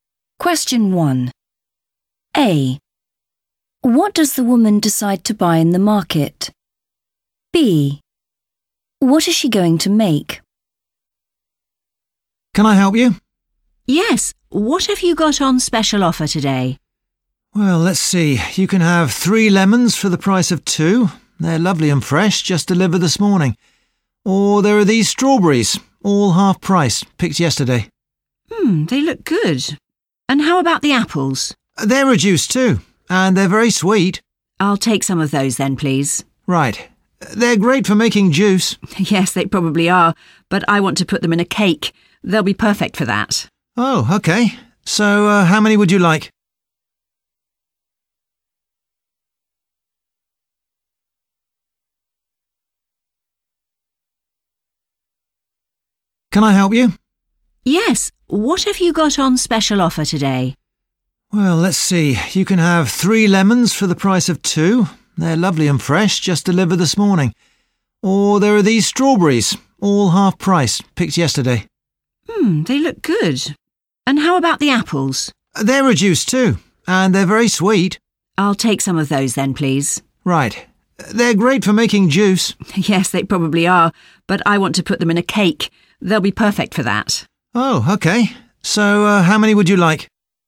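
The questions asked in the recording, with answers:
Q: What does the woman decide to buy in the market?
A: apples

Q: What is she going to make?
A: a cake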